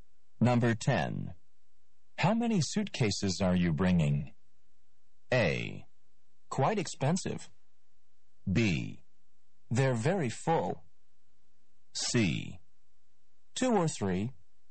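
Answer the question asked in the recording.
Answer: C: Two or three.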